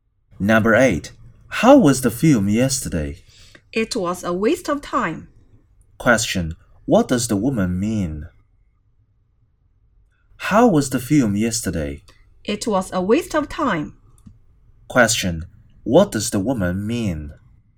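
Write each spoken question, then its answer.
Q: Question,What does the woman mean?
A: The film was not worth seeing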